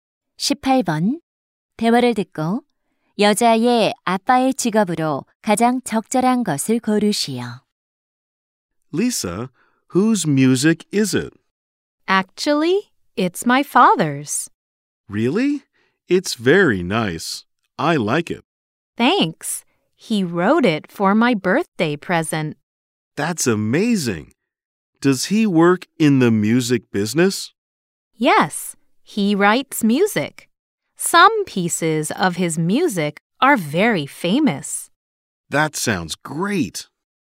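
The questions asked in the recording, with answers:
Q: 대화를 듣고 여자의 아빠의 직업으로 가장 적절한 것을 고르시오.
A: 작곡가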